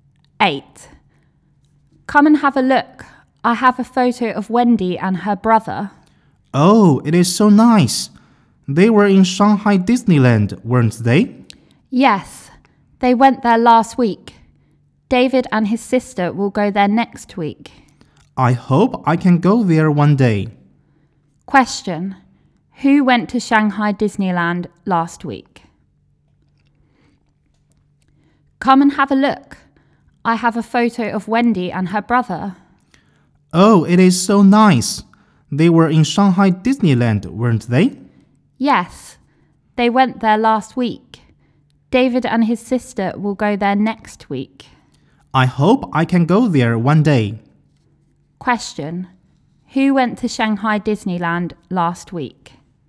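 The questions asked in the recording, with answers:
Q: Who went to Shanghai Disneyland last week?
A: Wendy and her brother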